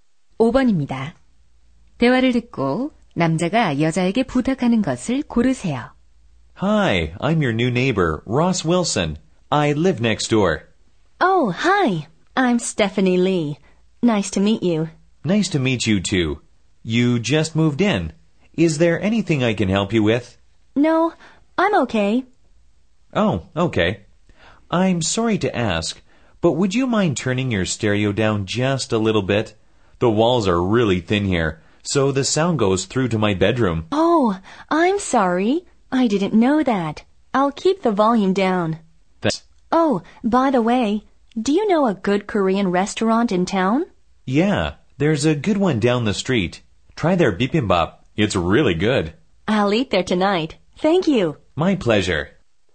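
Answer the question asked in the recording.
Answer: 스테레오 소리를 줄여 달라는 것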